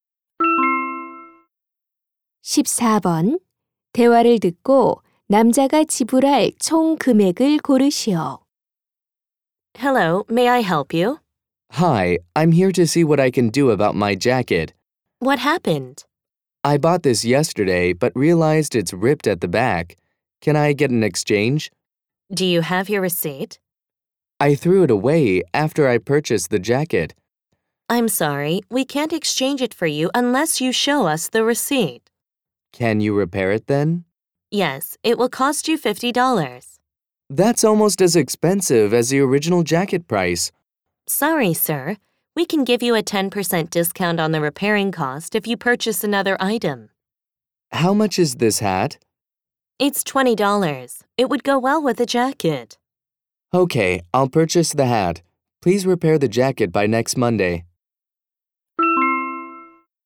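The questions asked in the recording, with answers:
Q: 대화를 듣고 남자가 지불할 총 금액을 고르시오.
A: 65달러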